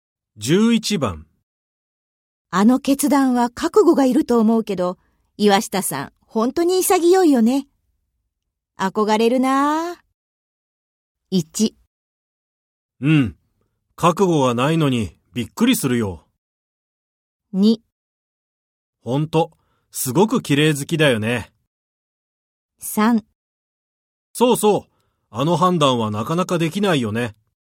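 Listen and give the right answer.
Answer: 3: そうそう、あの判断はなかなかできないよね。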